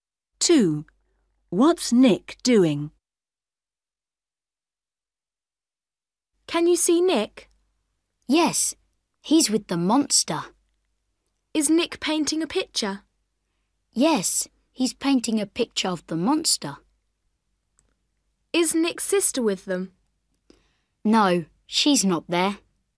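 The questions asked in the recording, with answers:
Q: What's Nick doing?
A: painting a picture of the monster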